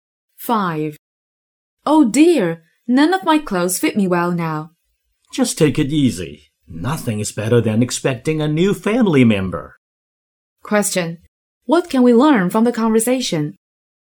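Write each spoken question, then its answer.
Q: What can we learn from the conversation?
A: The woman is pregnant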